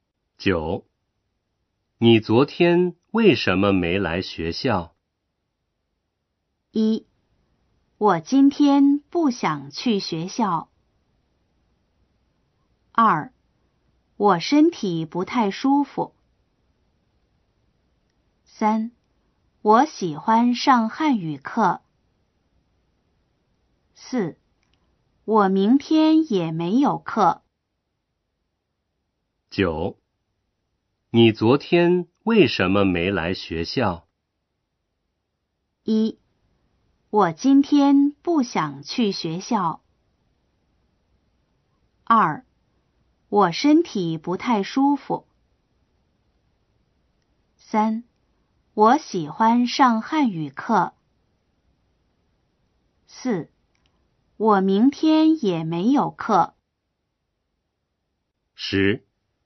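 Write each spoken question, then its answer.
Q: 你昨天为什么没来学校?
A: 2: 我身体不太舒服。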